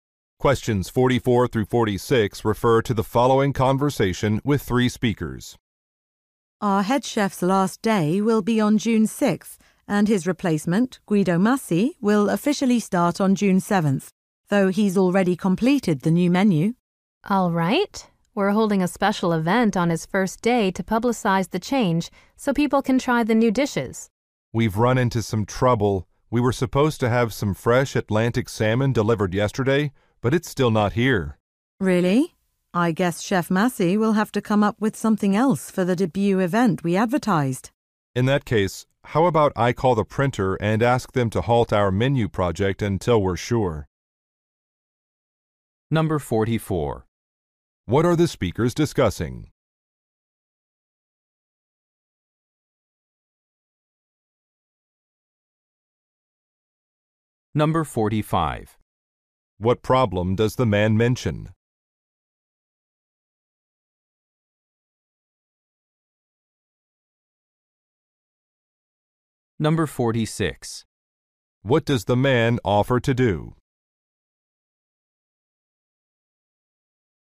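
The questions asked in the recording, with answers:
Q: What are the speakers discussing?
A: A new head chef and new menu at the restaurant

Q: What problem does the man mention?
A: A salmon delivery has not arrived

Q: What does the man offer to do?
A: Call the printer to halt the menu project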